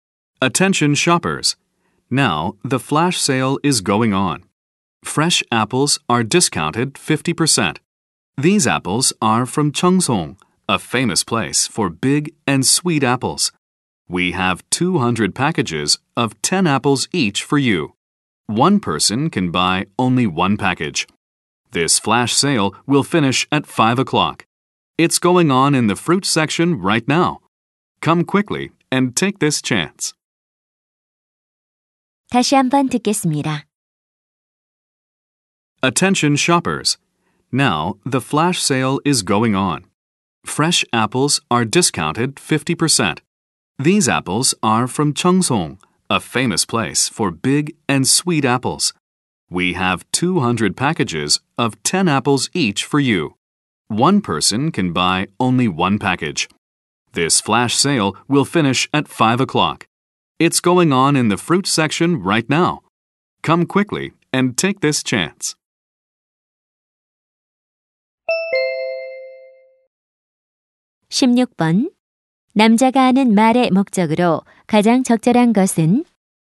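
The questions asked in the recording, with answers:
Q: 남자가 하는 말의 목적으로 가장 적절한 것은?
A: 사과 반짝 세일을 홍보하려고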